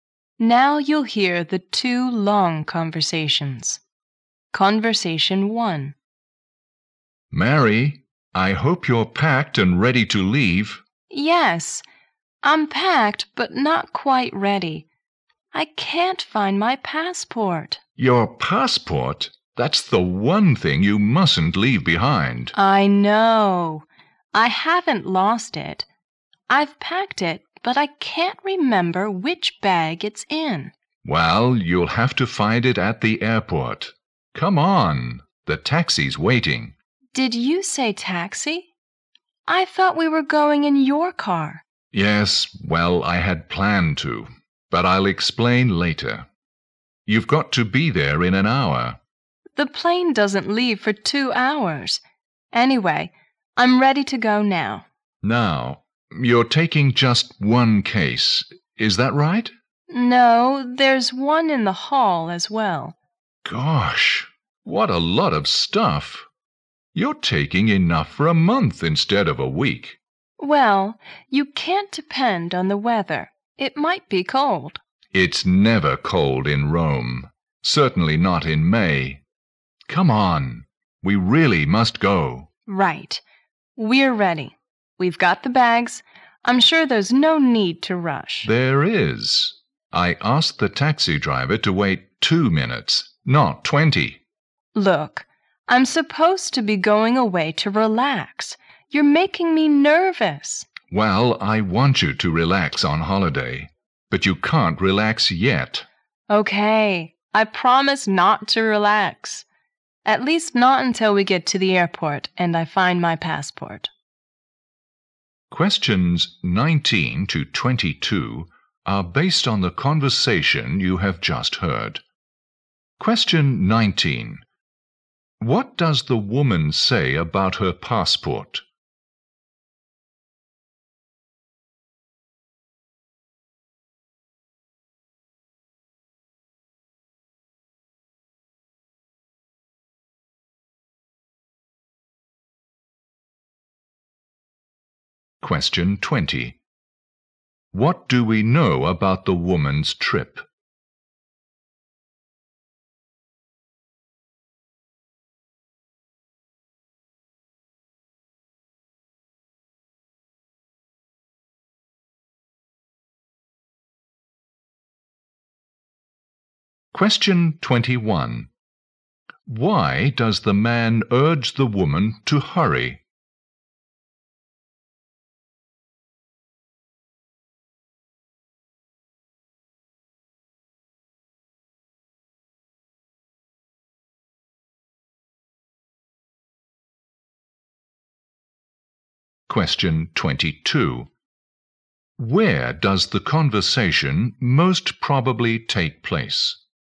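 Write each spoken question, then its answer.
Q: What does the woman say about her passport?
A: She has packed it but can't remember which bag it's in.

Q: What do we know about the woman's trip?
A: She's going to Rome for a week's holiday.

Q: Why does the man urge the woman to hurry?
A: The taxi is waiting; he asked the driver to wait only 2 minutes.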